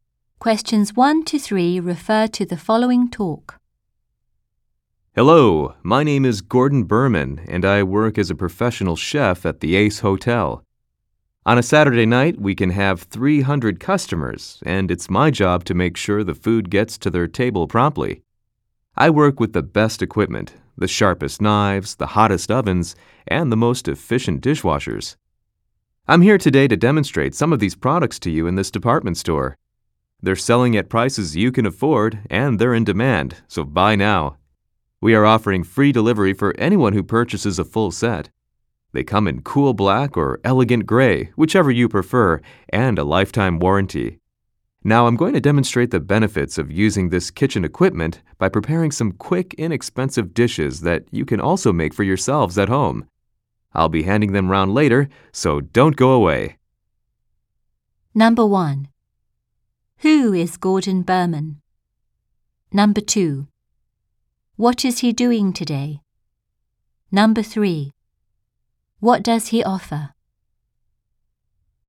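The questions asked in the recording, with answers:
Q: Who is Gordon Berman?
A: A professional chef at the Ace Hotel

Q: What is he doing today?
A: Demonstrating kitchen equipment in a department store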